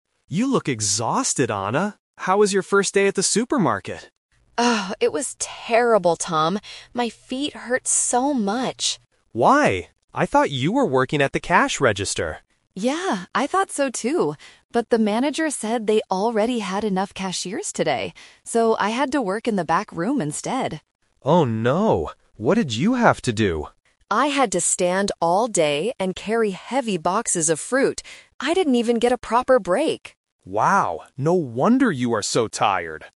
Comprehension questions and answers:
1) What did Anna expect to do at the supermarket today?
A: Work at the cash register

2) Why did Anna's job change today?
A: Because there were already enough cashiers.

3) What is Anna complaining about?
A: She had to stand all day and carry boxes.

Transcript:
Tom: You look exhausted, Anna. How was your first day at the supermarket?
Anna: Oh, it was terrible, Tom. My feet hurt so much.
Tom: Why? I thought you were working at the cash register.
Anna: Yeah, I thought so too! But the manager said they already had enough cashiers today. So, I had to work in the back room instead.
Tom: Oh no. What did you have to do?
Anna: I had to stand all day and carry heavy boxes of fruit. I didn't even get a proper break!
Tom: Wow, no wonder you are so tired.